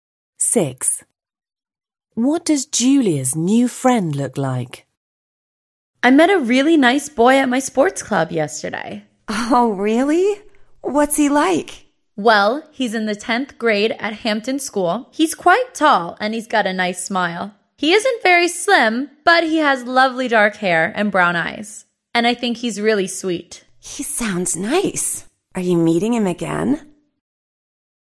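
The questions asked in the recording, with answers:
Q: What does Julia's new friend look like?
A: Tall, not very slim, with dark hair and brown eyes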